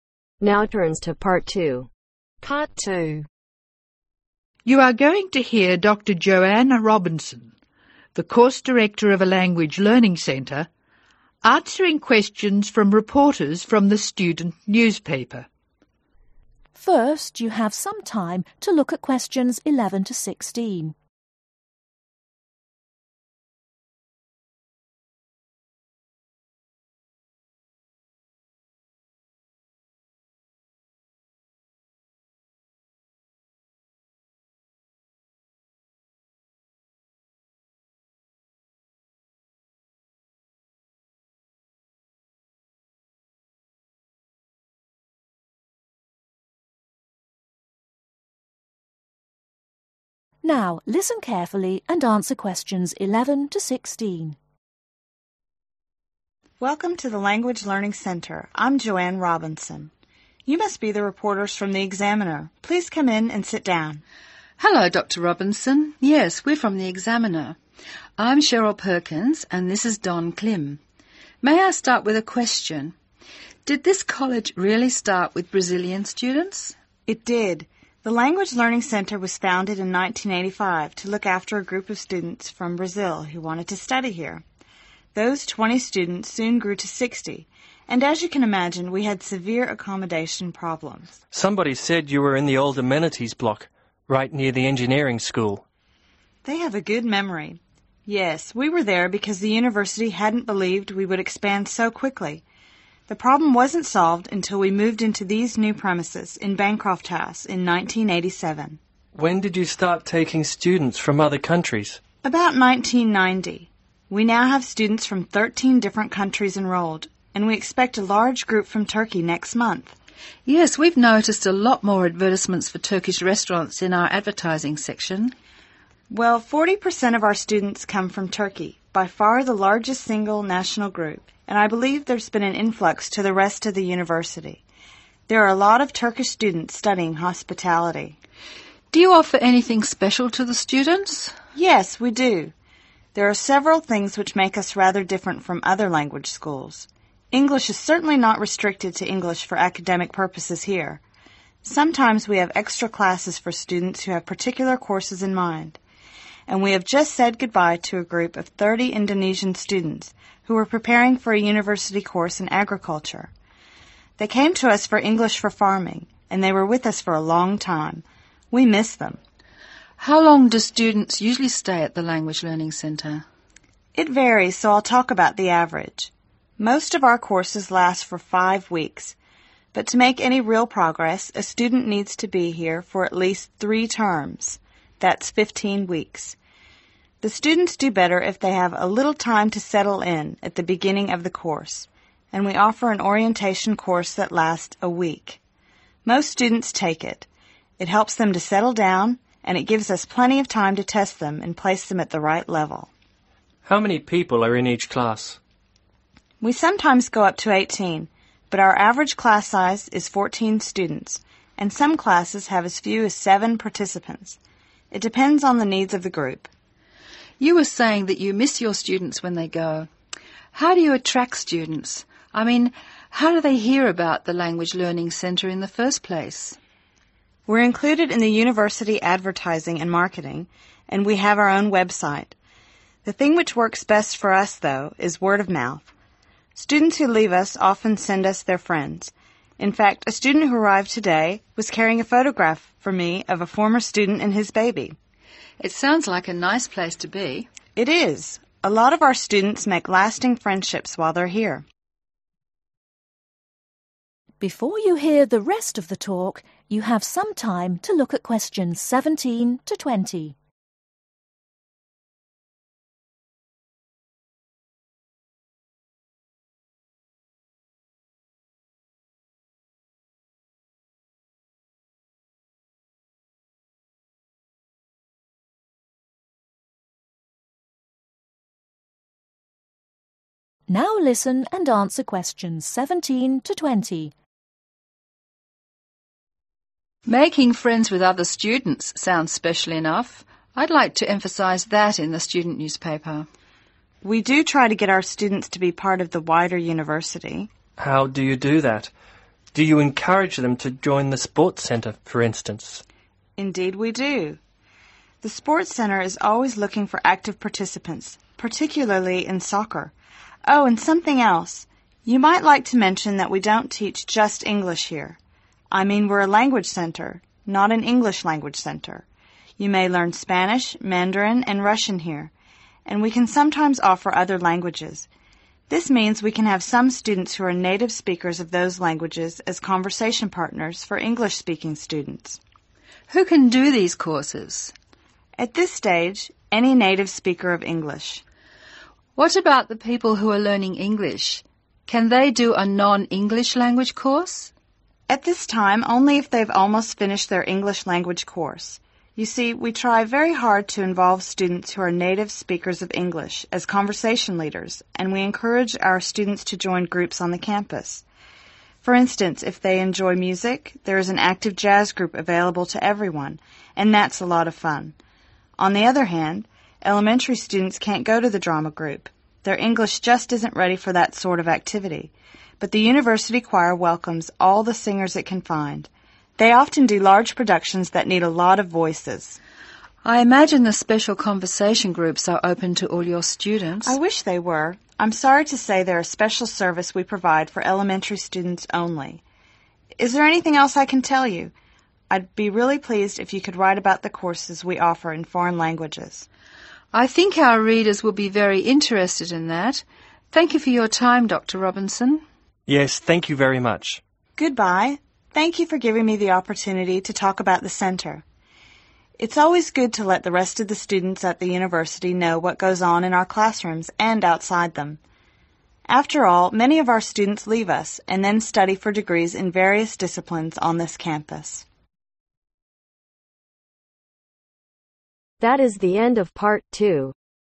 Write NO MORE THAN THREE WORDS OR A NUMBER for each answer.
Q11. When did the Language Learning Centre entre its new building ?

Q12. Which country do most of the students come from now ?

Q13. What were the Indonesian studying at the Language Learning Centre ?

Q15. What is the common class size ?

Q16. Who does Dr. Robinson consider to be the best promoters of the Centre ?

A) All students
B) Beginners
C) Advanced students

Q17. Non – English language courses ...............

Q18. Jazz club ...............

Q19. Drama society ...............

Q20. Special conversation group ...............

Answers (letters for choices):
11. 1987
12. Turkey
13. English for farming
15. 14 students
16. Former/old students
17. C
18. A
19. C
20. B